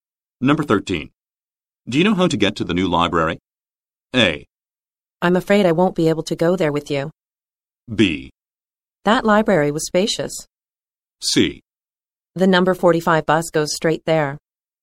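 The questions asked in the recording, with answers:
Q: Do you know how to get to the new library?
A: C: The number 45 bus goes straight there.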